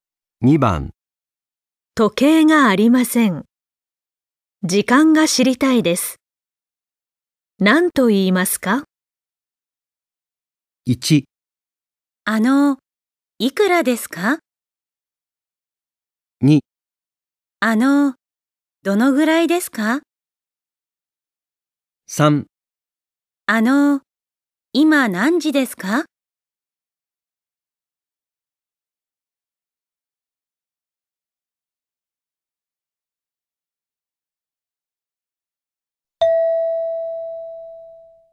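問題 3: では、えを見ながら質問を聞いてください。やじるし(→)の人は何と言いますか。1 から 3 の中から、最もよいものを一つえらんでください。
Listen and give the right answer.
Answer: 今何時ですか

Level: N5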